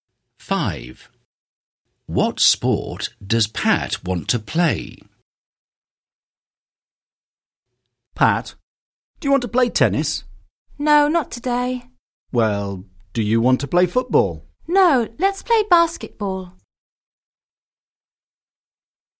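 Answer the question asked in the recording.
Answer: basketball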